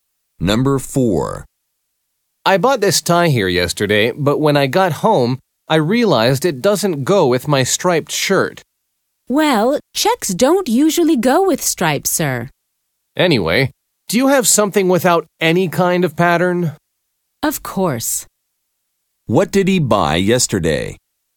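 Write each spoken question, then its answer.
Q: What did he buy yesterday?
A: A checked tie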